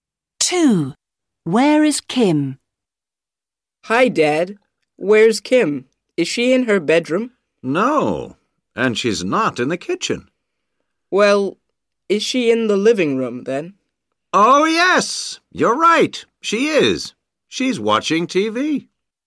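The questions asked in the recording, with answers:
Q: Where is Kim?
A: In the living room, watching TV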